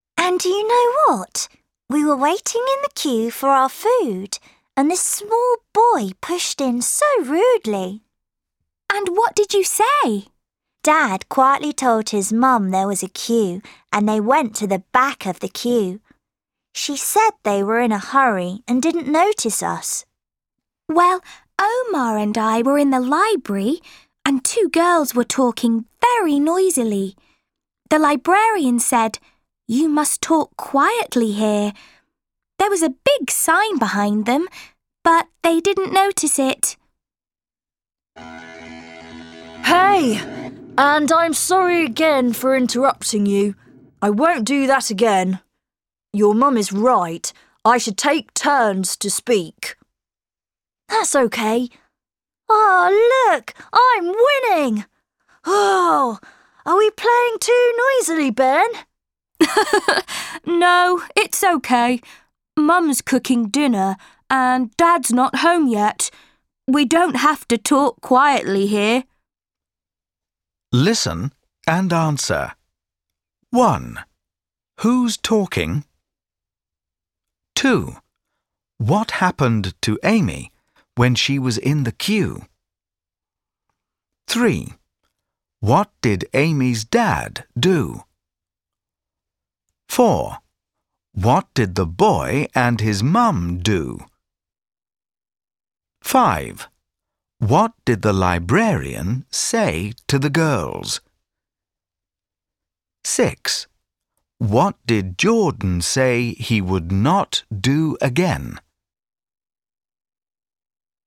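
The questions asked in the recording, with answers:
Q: What happened to Amy when she was in the queue?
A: A small boy pushed in rudely in front of her.

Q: What did Amy's dad do?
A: He quietly told the boy's mum there was a queue.

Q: What did the boy and his mum do?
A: They went to the back of the queue.

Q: What did the librarian say to the girls?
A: "You must talk quietly here."

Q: What did Jordan say he would not do again?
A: Interrupt people.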